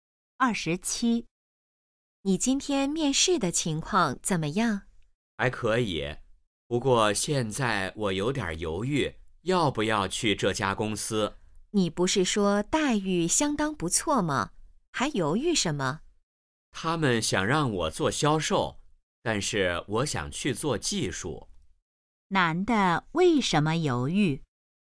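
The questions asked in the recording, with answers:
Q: 男的为什么犹豫?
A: 公司想让他做销售,他想做技术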